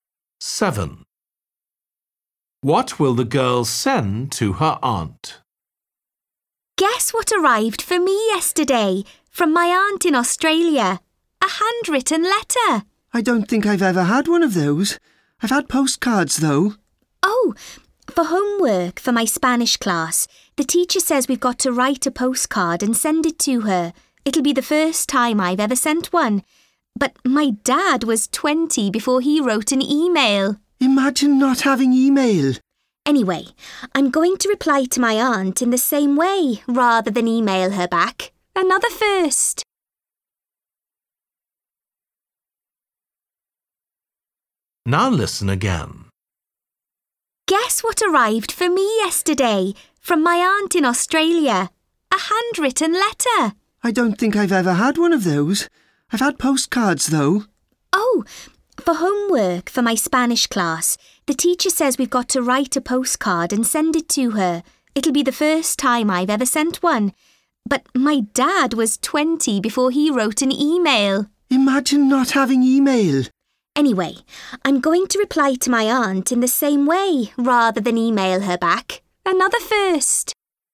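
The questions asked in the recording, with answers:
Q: What will the girl send to her aunt?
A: a handwritten letter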